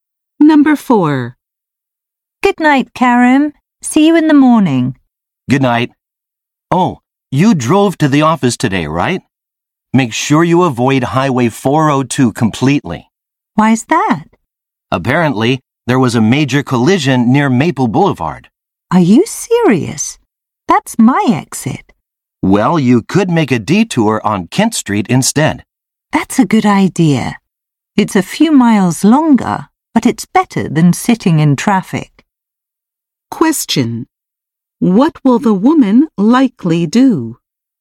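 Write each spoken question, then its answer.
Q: What will the woman likely do?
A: Take a detour on Kent Street.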